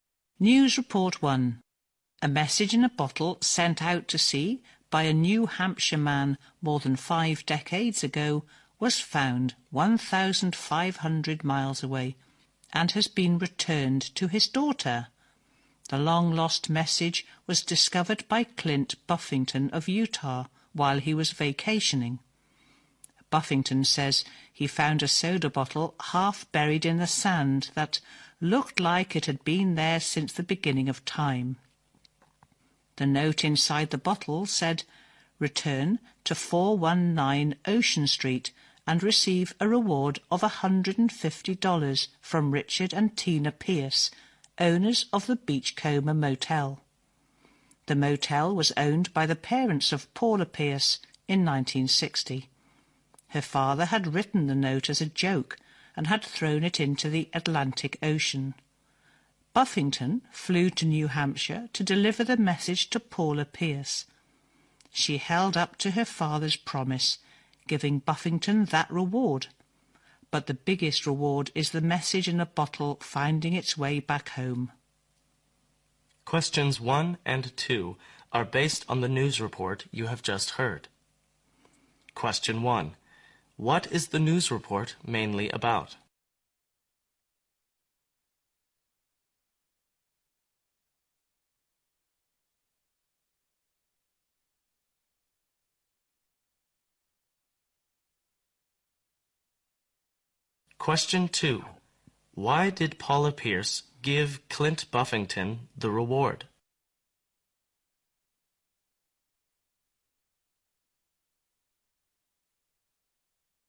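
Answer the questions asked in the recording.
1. A message in a bottle sent out to sea over 50 years ago was found and returned to the sender's daughter.
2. To honour her father's promise in the note.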